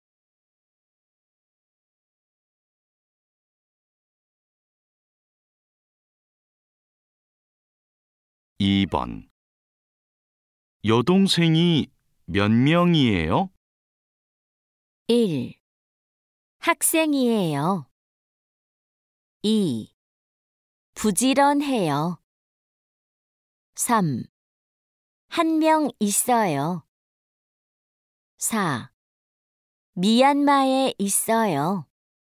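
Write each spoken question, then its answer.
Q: 여동생이 몇 명이에요?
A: 3: 한 명 있어요.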